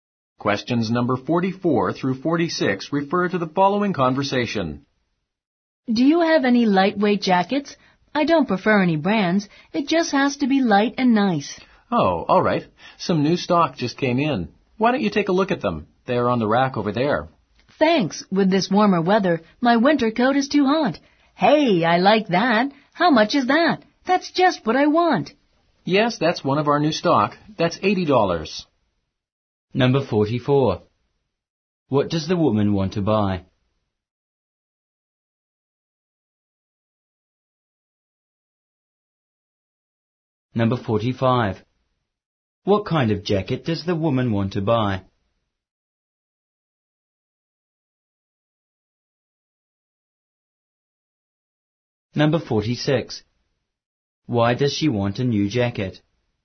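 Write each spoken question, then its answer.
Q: What does the woman want to buy?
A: A jacket

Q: What kind of jacket does the woman want to buy?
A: A lightweight jacket

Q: Why does she want a new jacket?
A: The weather is warmer and her winter coat is too hot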